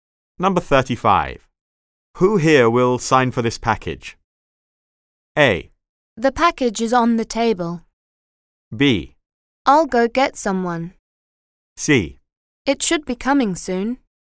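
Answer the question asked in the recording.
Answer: B: I'll go get someone.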